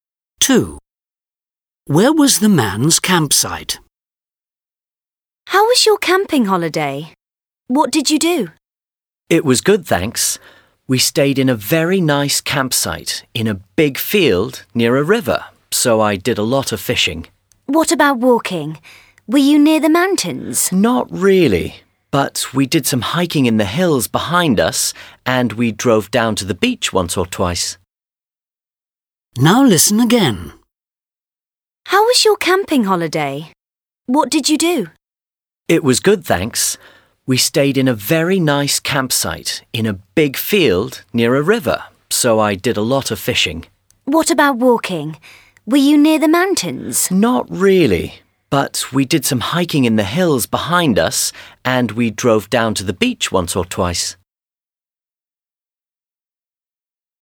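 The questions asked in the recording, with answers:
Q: Where was the man's campsite?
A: In a big field near a river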